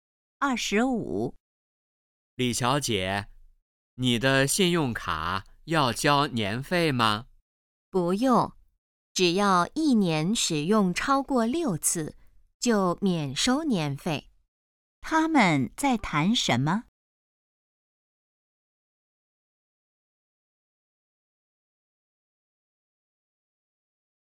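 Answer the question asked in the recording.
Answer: 信用卡年费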